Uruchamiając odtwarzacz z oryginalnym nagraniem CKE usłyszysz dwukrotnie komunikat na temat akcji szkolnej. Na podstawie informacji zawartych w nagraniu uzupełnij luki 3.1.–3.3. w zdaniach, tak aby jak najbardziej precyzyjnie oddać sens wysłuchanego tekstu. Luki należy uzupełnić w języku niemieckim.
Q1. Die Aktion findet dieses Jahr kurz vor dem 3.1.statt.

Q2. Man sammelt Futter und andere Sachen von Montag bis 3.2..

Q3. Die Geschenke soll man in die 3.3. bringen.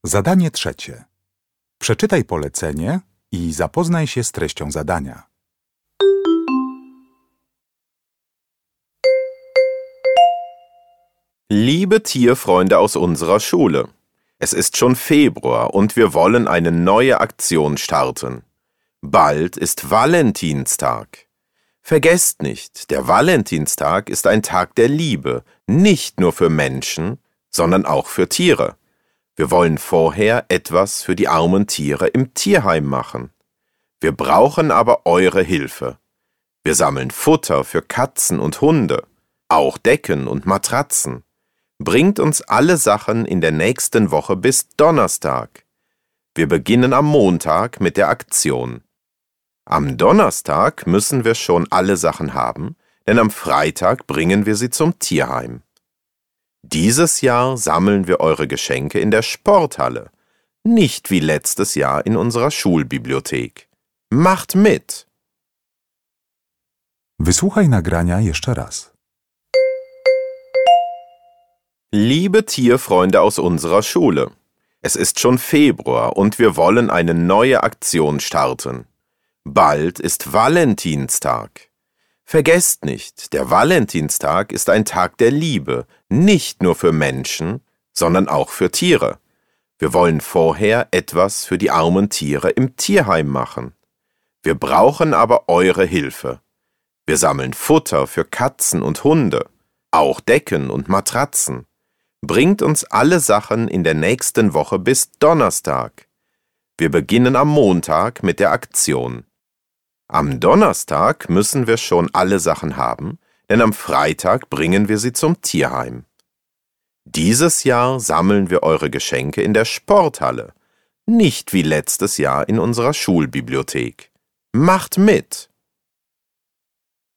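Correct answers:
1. Valentinstag
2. Donnerstag
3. Sporthalle

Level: egzamin ósmoklasisty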